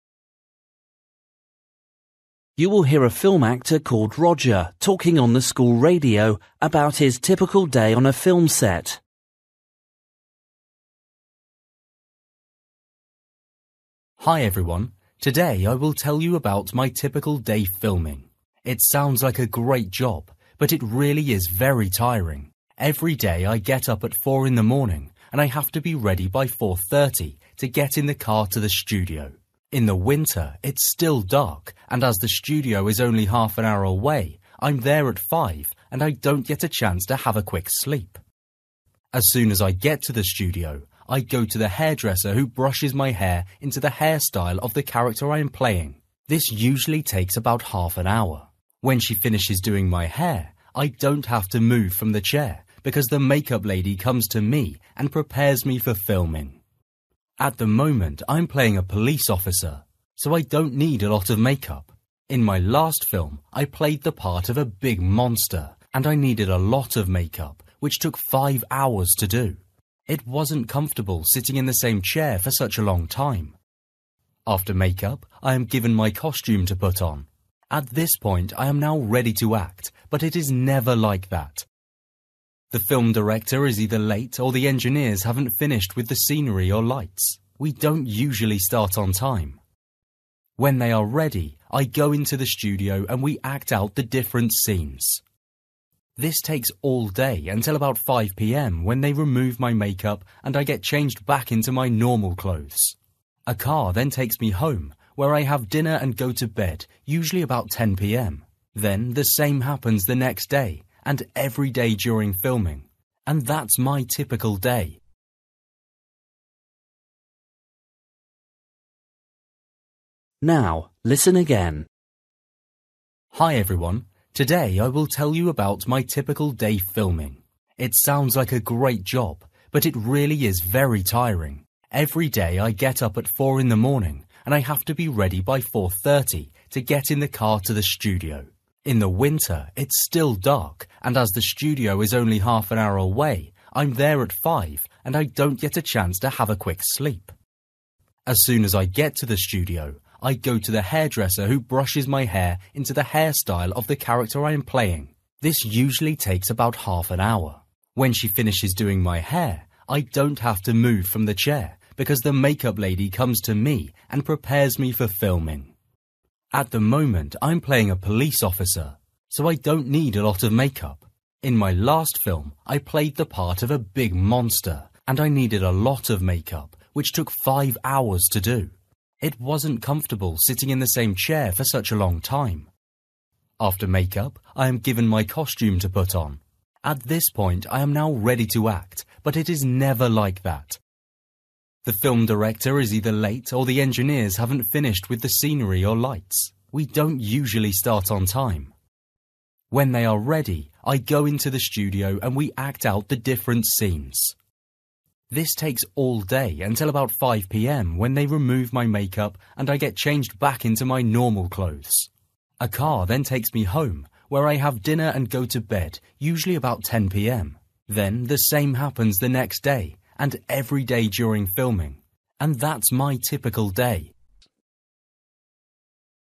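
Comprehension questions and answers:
For each question, write the correct answer in the gap. Write one or two words or a number or a date or a time. You will hear a film actor called Roger talking on the school radio about his typical day on a film set.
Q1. Roger arrives at the film studio at (1) a.m.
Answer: 5

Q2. A woman does his (2) after someone has brushed his hair.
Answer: makeup

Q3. Roger is playing a (3) in this new film.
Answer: police officer

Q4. Filming is delayed because the film (4) is often late.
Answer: director

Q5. When filming ends, Roger puts on his usual (5) .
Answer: clothes

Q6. Roger has (6) after he gets home and sleeps early.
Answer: dinner

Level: Luyện nghe trình độ B1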